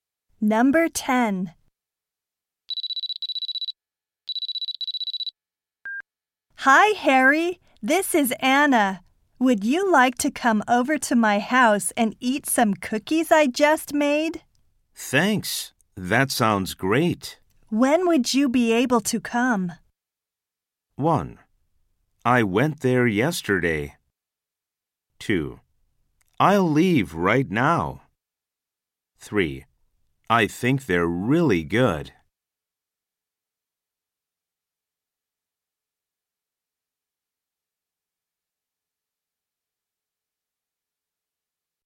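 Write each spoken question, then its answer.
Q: When would you be able to come?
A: 2: I'll leave right now.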